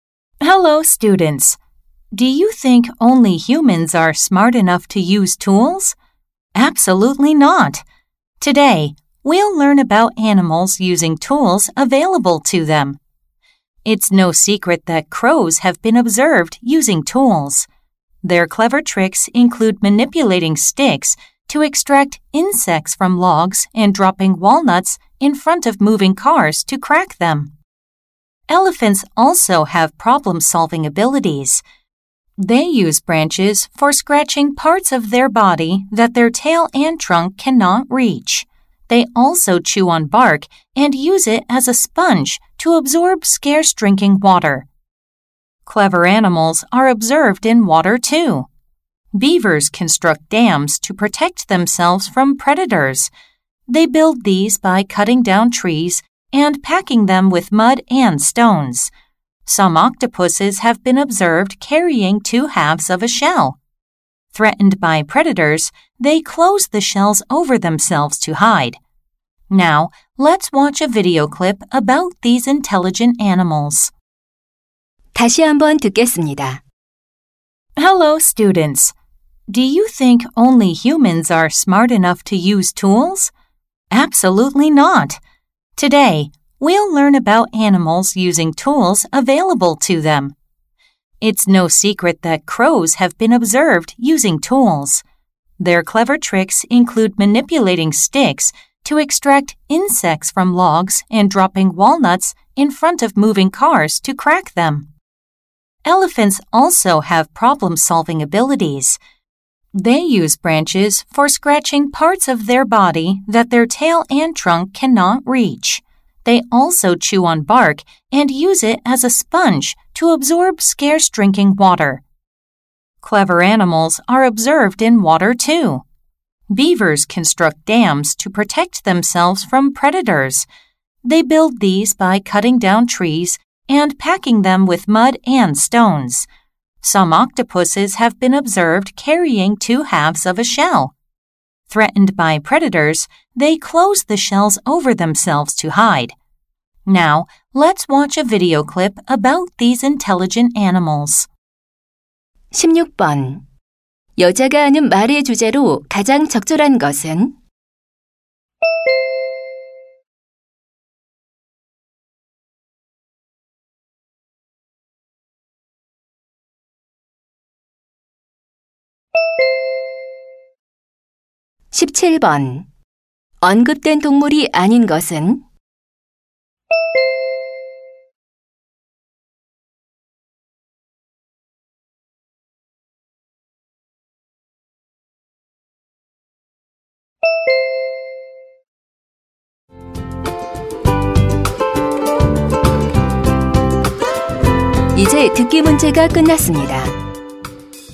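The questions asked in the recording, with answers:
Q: 여자가 하는 말의 주제로 가장 적절한 것은?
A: 도구를 사용하는 동물들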